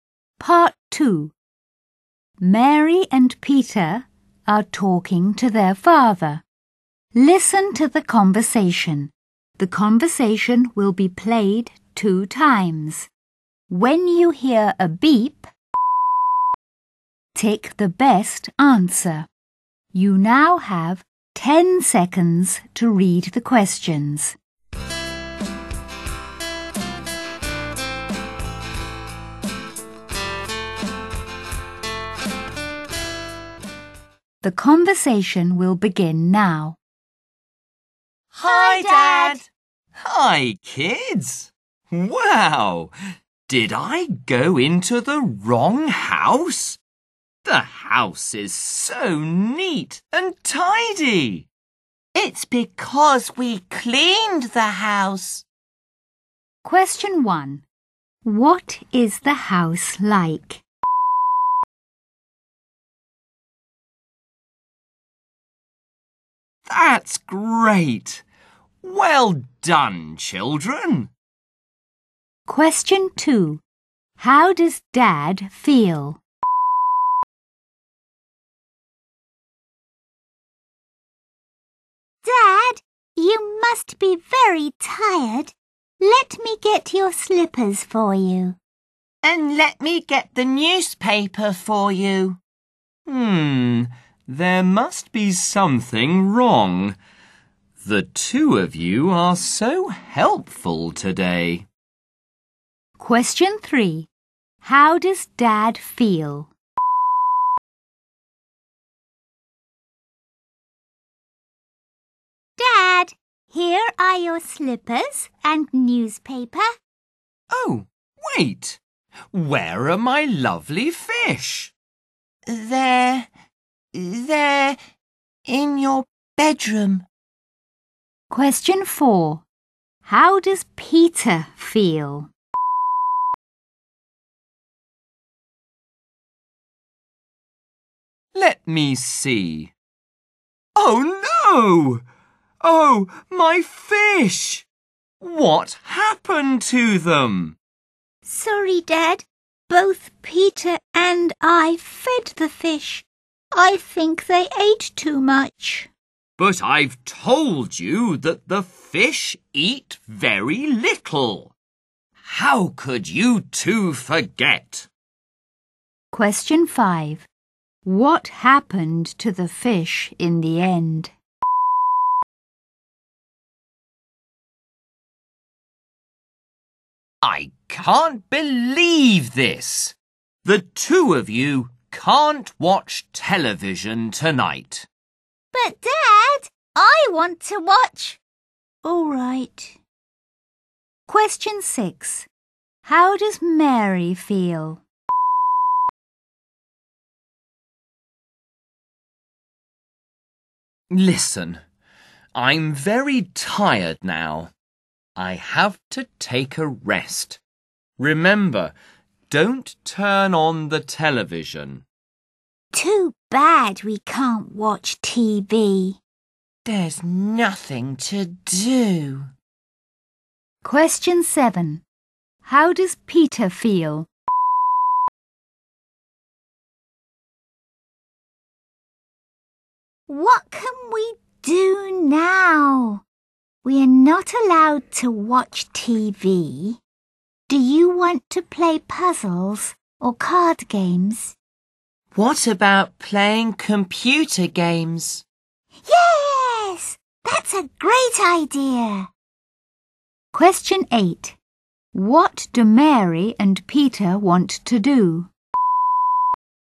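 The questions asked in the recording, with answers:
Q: What is the house like?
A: Neat and tidy

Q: What do Mary and Peter want to do?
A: Play computer games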